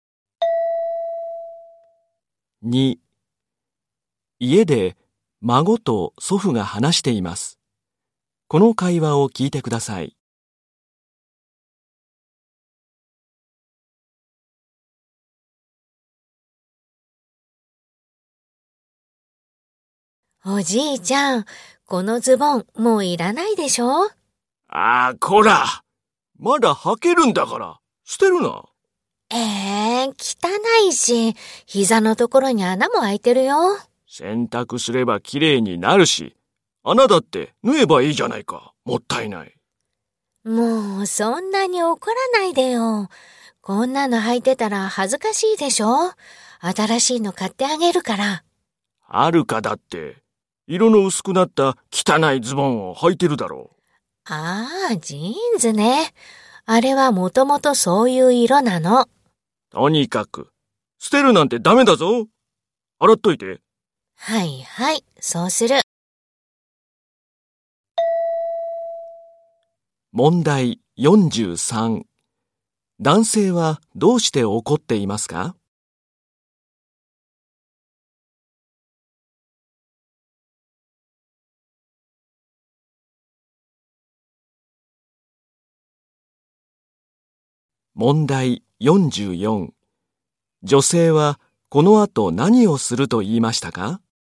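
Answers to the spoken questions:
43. まだ履けるズボンを捨てられそうになったから
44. ズボンを洗う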